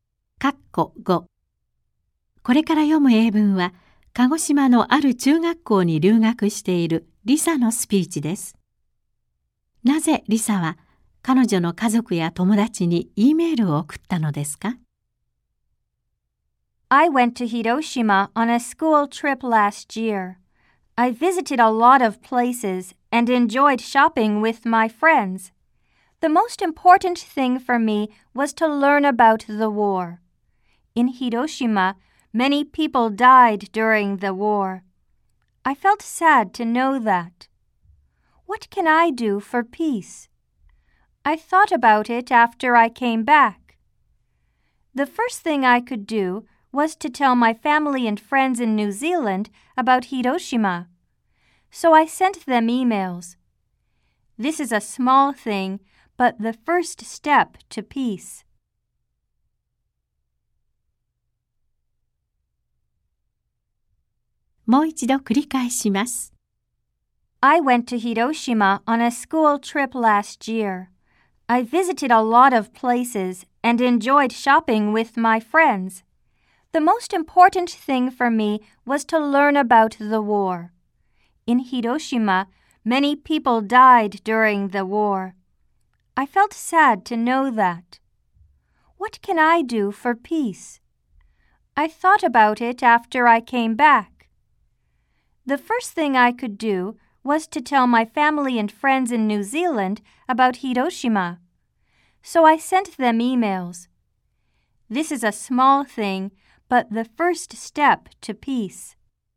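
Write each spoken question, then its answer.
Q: なぜリサは彼女の家族や友達に E メールを送ったのですか?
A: ニュージーランドの家族や友達に広島のことを伝えるため(平和への第一歩として)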